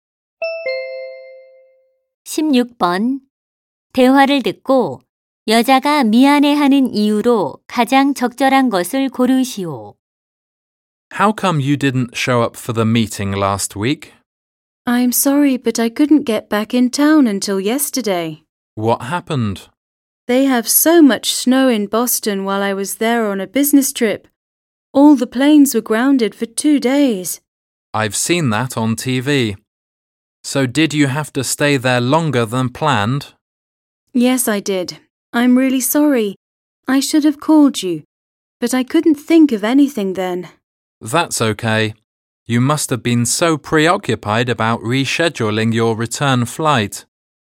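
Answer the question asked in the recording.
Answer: 연락 없이 회의에 참석하지 못해서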